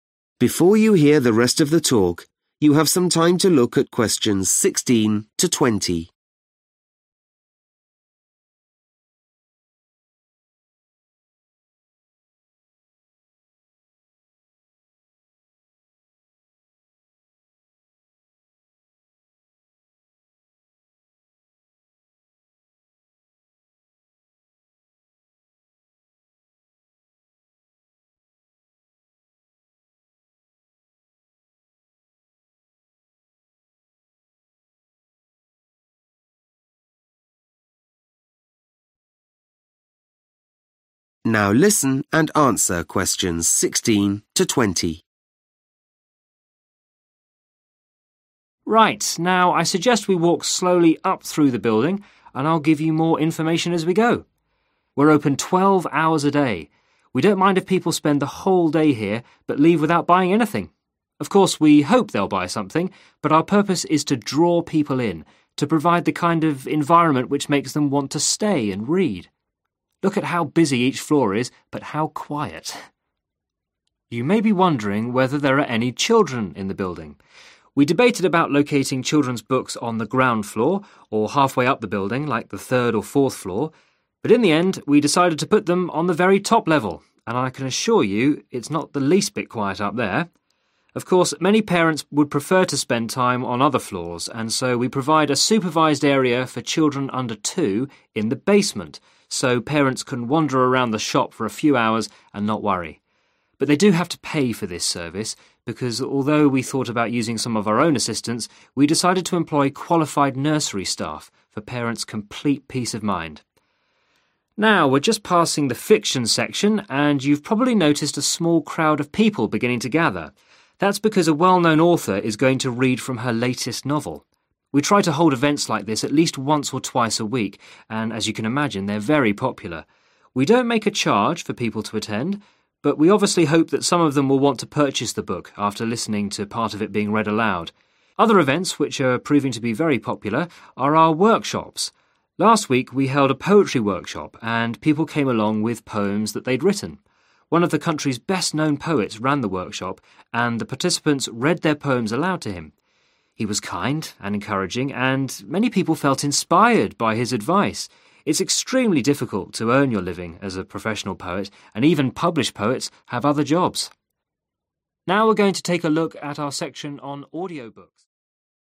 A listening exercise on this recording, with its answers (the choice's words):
Choose the correct letter, A, B or C.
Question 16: The bookshop aims to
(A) sell as many books as possible.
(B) create an energetic environment.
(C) attract people to remain in the shop.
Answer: attract people to remain in the shop.

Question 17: Children's books are located on the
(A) ground floor.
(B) highest level.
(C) middle floor.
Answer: highest level.

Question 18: To allow parents to relax, the bookshop provides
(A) trained floor staff to take care of children.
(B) a free nursery service.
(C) professional child care.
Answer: professional child care.

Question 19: The aim of the regular book readings is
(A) to sell more books.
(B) to bring authors together.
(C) to generate income by charging for tickets.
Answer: to sell more books.

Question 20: Participants at the poetry workshop were able to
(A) have their work published.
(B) become professional poets.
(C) receive feedback and encouragement from an expert.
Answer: receive feedback and encouragement from an expert.